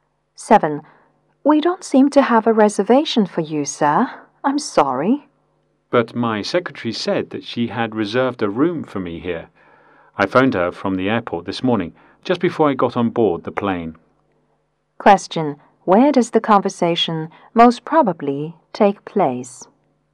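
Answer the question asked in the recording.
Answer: At a hotel.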